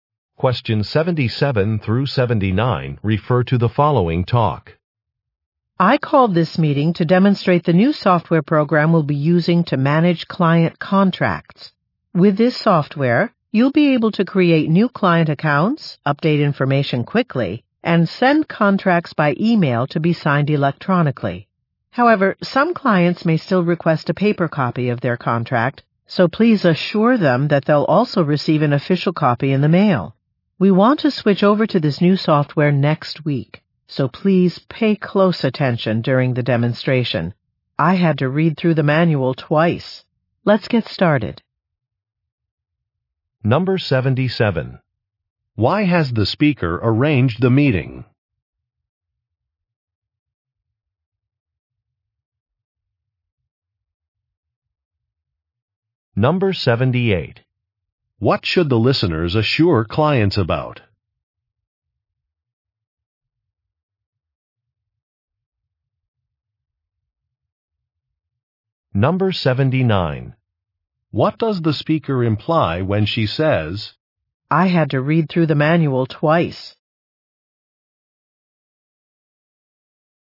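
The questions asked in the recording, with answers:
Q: Why has the speaker arranged the meeting?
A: To demonstrate new contract-management software

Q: What should the listeners assure clients about?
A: They will also receive an official paper copy by mail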